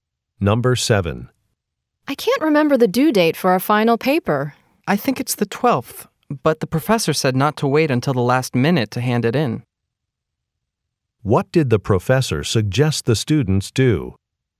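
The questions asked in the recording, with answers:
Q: What did the professor suggest the students do?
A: Hand in the paper before the due date.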